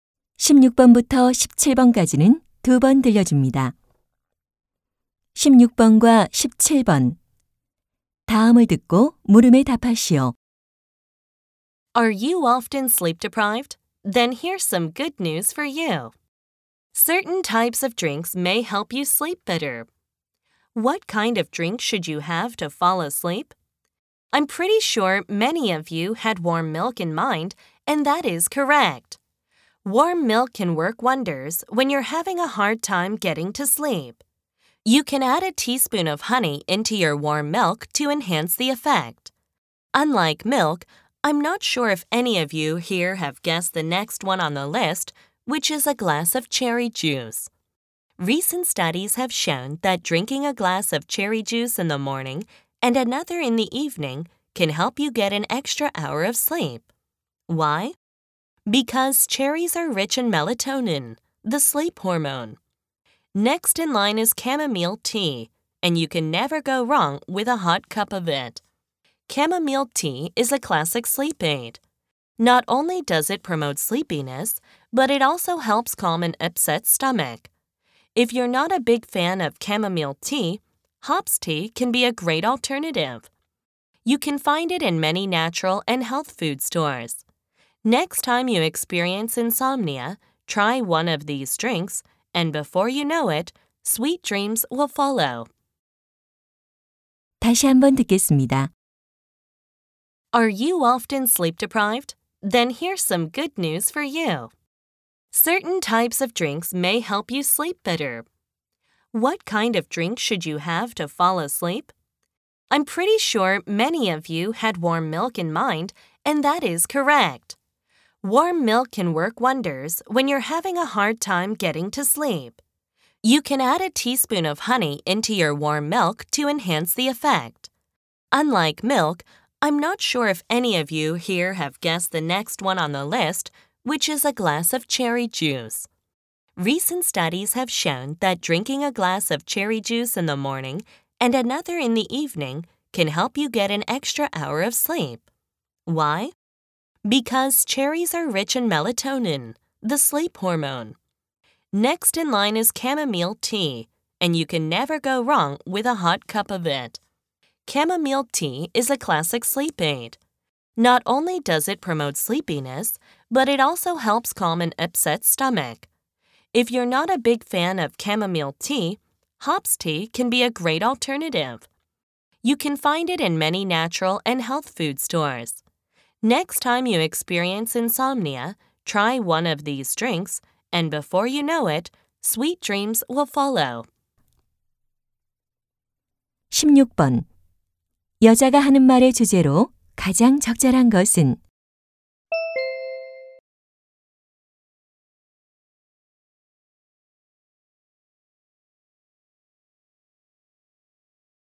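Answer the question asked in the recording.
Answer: 잠이 잘 오게 도와주는 음료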